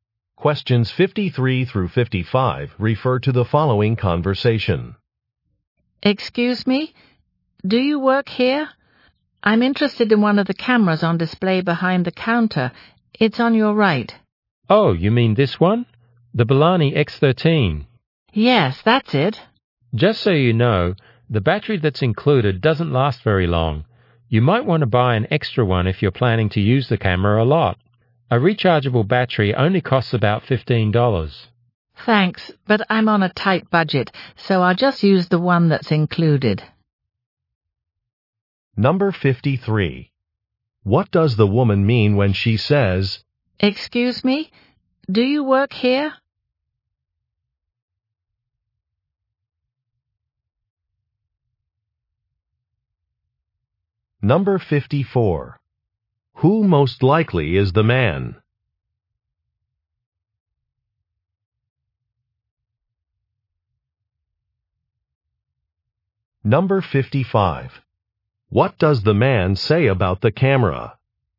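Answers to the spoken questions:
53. She wants help from a store employee
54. A store salesperson
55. Its included battery doesn't last long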